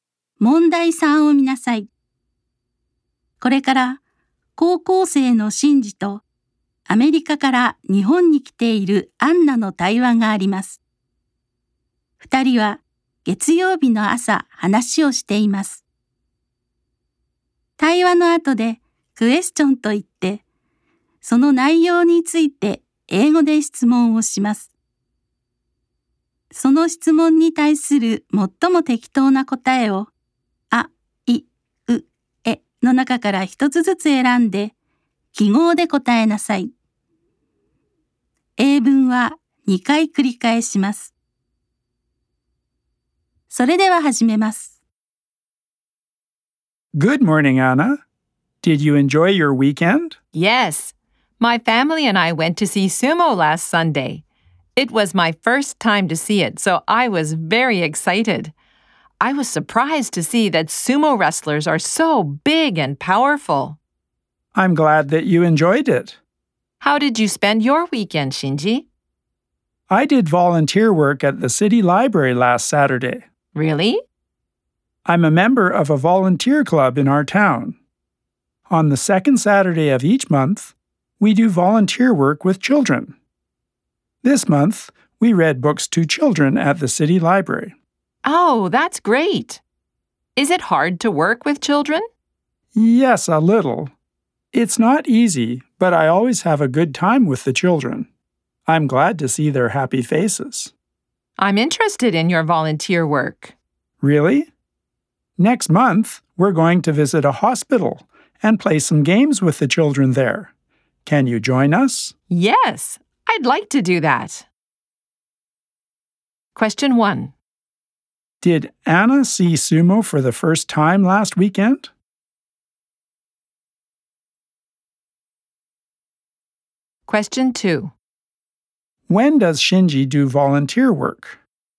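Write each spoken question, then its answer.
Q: Did Anna see sumo for the first time last weekend?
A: Yes, she did.

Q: When does Shinji do volunteer work?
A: On the second Saturday of each month.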